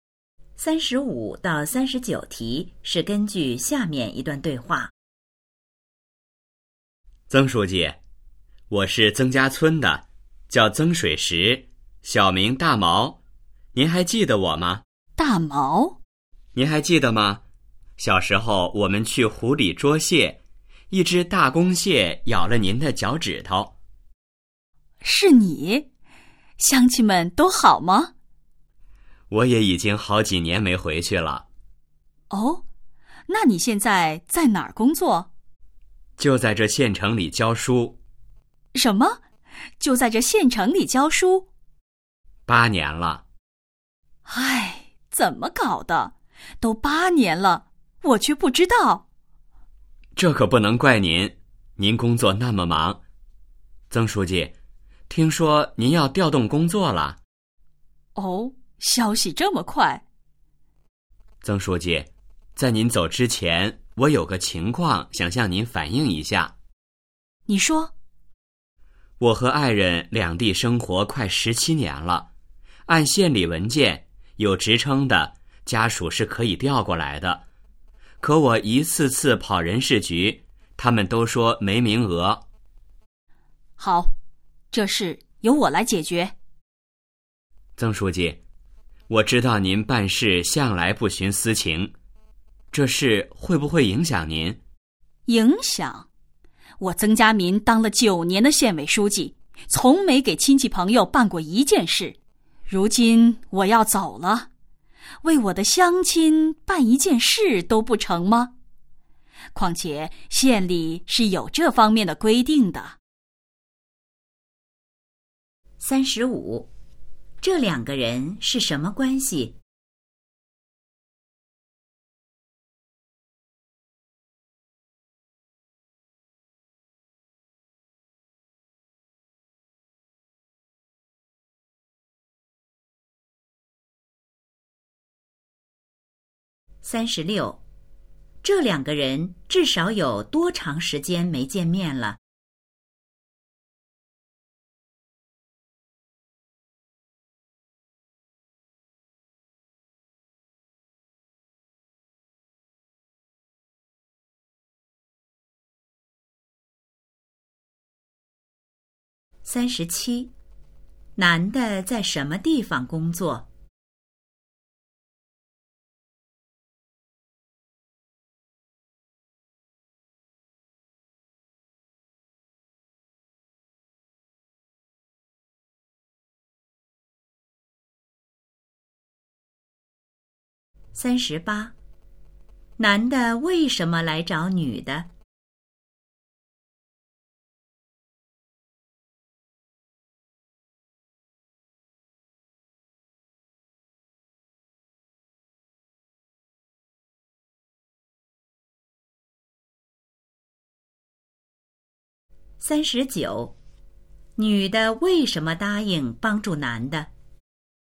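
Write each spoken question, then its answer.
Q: 这两个人是什么关系?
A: 同乡(同村的乡亲)

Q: 男的在什么地方工作?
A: 在县城里教书

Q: 男的为什么来找女的?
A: 想把爱人调过来

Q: 女的为什么答应帮助男的?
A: 男的是她的乡亲,而且县里有这方面的规定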